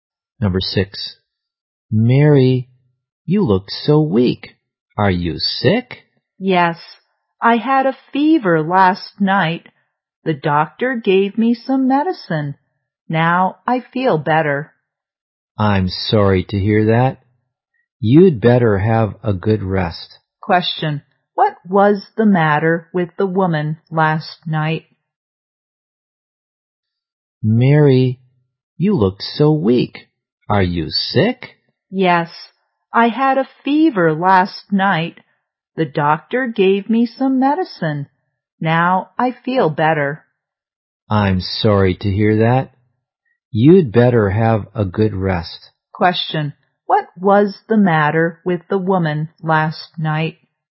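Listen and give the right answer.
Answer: She had a fever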